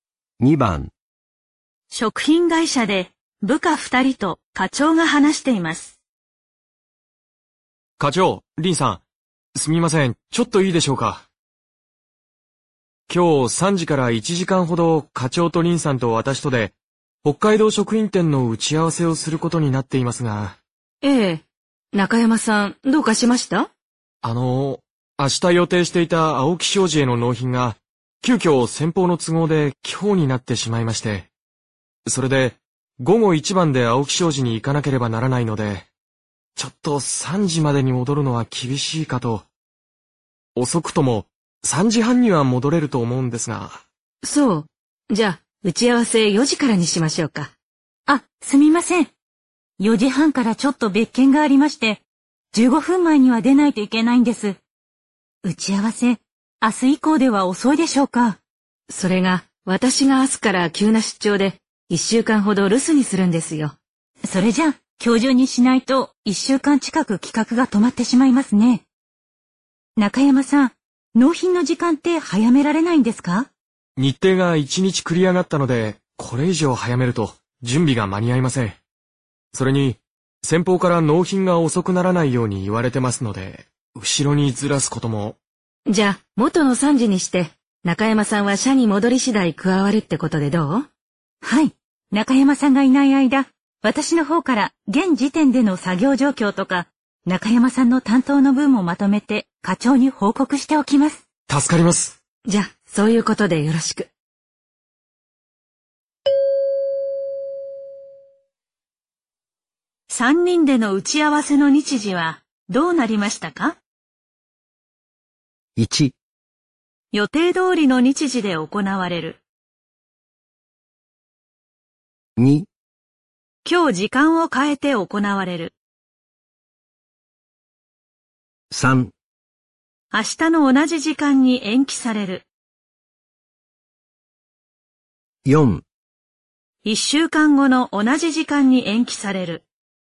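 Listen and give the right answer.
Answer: 1: 予定通りの日時で行われる。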